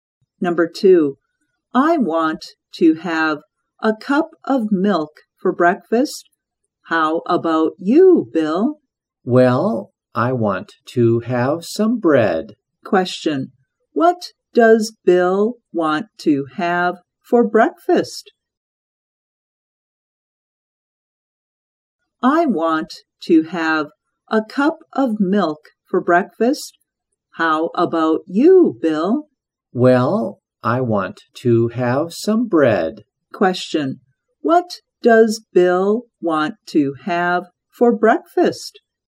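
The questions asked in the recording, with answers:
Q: what does Bill want to have for breakfast?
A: Some bread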